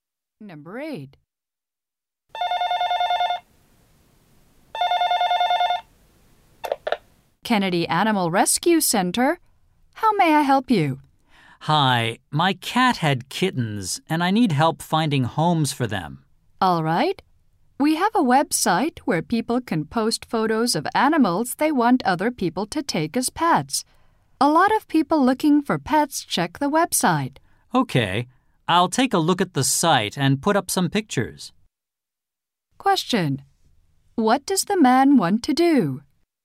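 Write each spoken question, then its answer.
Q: What does the man want to do?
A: Find homes for his cat's kittens.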